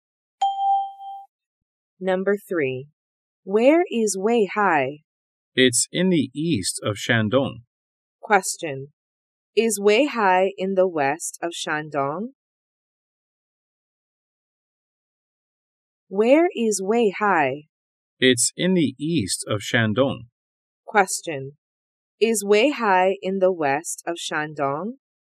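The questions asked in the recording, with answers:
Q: Is Weihai in the west of Shandong?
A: No, it's in the east of Shandong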